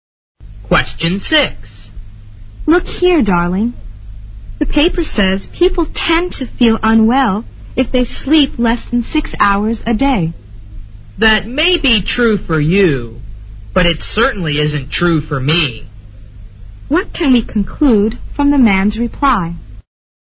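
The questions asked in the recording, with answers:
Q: What can we conclude from the man's reply?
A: He feels fine with less than 6 hours of sleep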